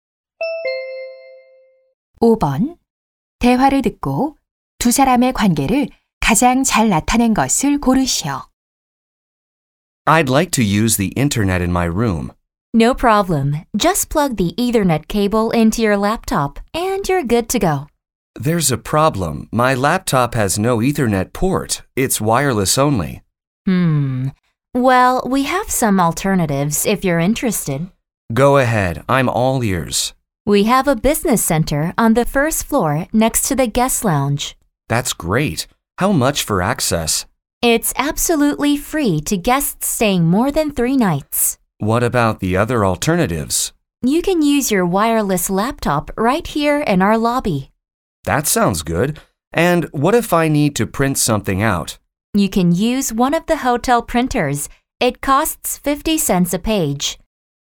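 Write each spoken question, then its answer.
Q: 대화를 듣고 두 사람의 관계를 가장 잘 나타낸 것을 고르시오.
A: 호텔 직원과 투숙객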